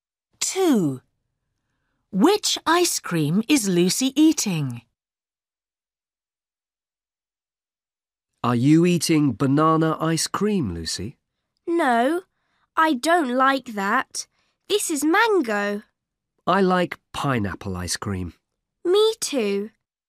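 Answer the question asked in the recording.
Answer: mango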